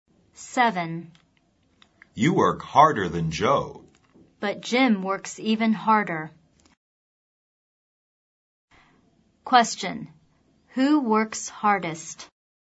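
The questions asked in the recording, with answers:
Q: Who works hardest?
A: Jim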